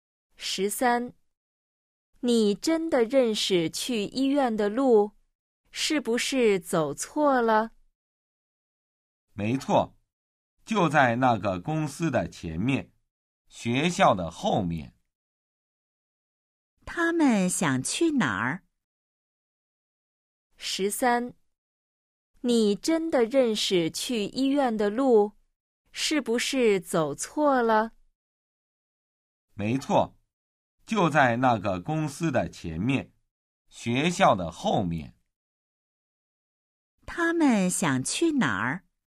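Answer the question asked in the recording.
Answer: 医院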